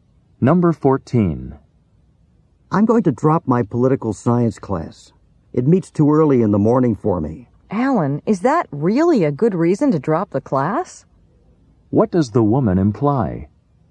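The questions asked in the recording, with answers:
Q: What does the woman imply?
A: Class being early is not a good reason to drop it.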